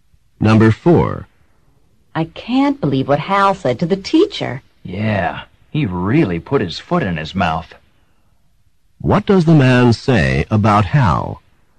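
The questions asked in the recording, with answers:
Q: What does the man say about Hal?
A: Hal said something embarrassing or wrong to the teacher.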